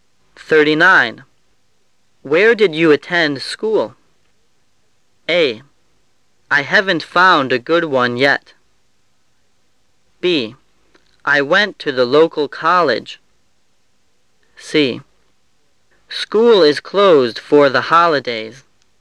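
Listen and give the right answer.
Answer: B: I went to the local college.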